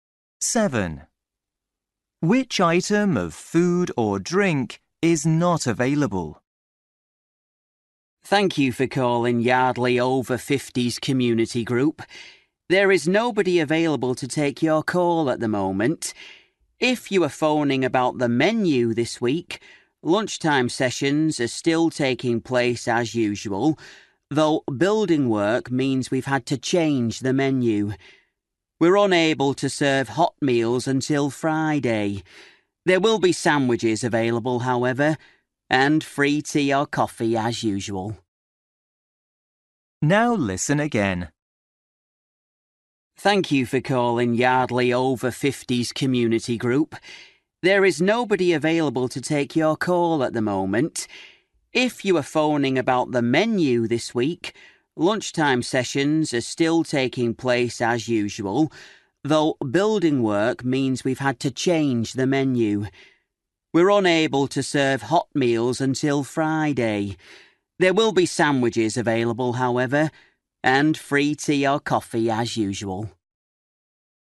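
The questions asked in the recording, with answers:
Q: Which item of food or drink is not available?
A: hot meals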